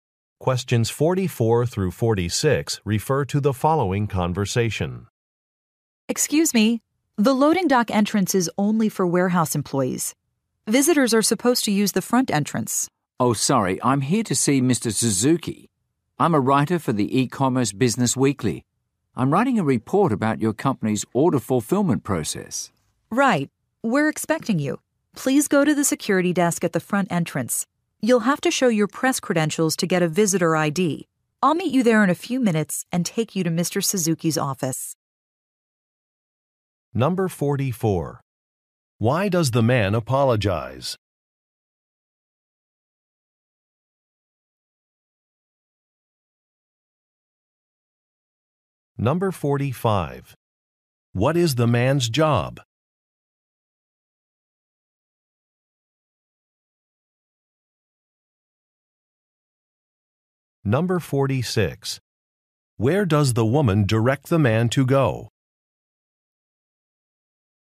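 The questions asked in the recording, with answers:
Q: Why does the man apologize?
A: He used the employee-only entrance

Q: What is the man's job?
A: A writer (journalist)

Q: Where does the woman direct the man to go?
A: The security desk at the front entrance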